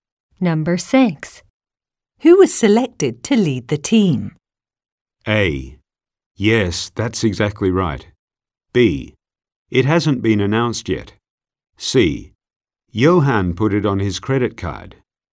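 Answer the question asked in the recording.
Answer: B: It hasn't been announced yet.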